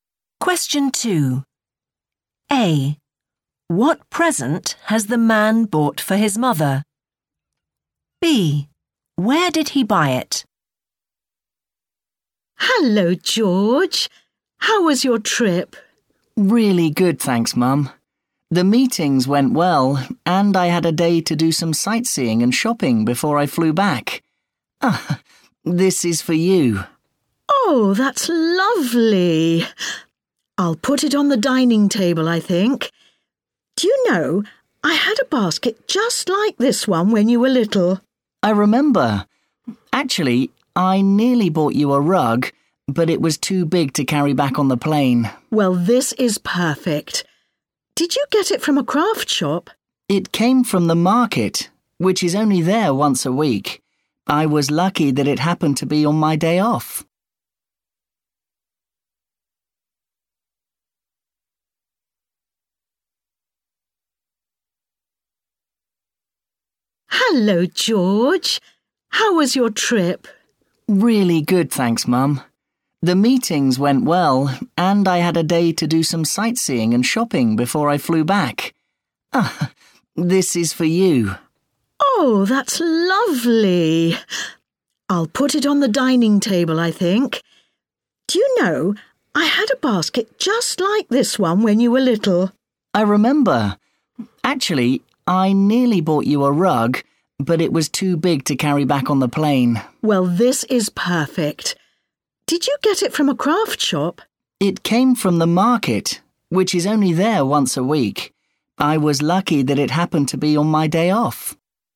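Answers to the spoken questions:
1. a basket
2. at the market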